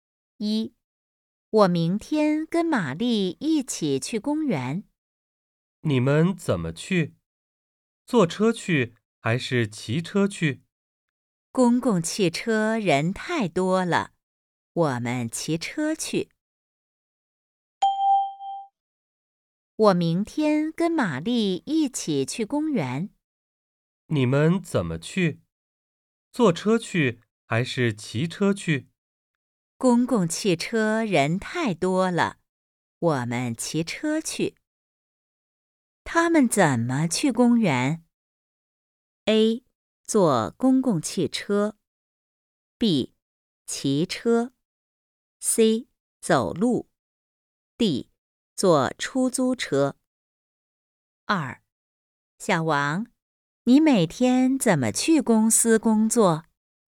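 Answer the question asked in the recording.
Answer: B: 骑车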